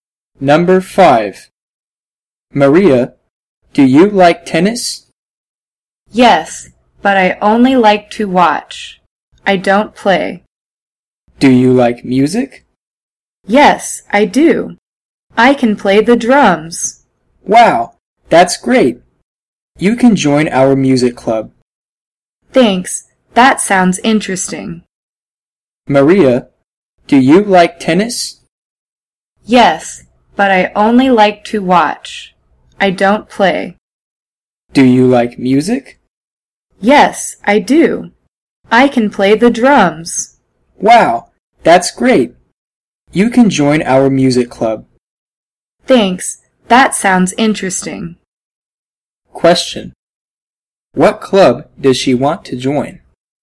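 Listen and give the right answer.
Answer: The music club.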